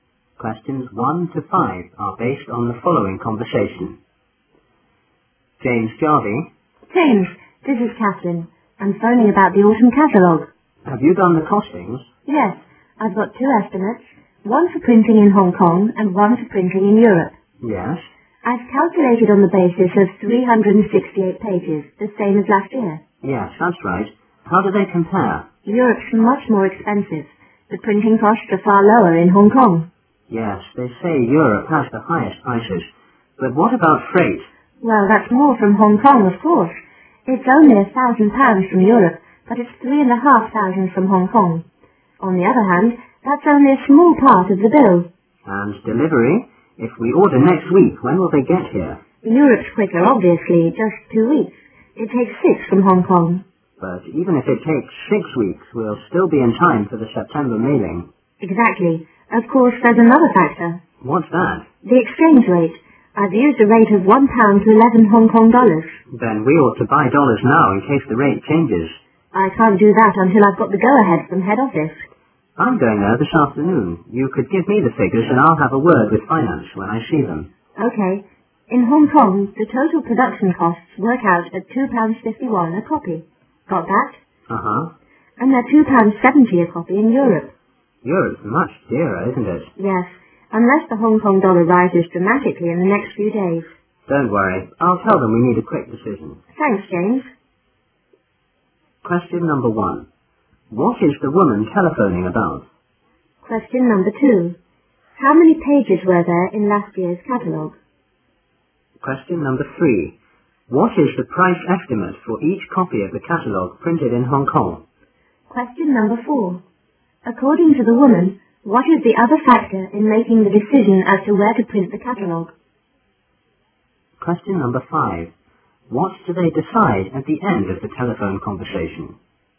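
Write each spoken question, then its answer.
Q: What is the woman telephoning about?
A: The costings for the autumn catalogue

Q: How many pages were there in last year's catalogue?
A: 368

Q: What is the price estimate for each copy of the catalogue printed in Hong Kong?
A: £2.51 a copy

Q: According to the woman, what is the other factor in making the decision as to where to print the catalogue?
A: The exchange rate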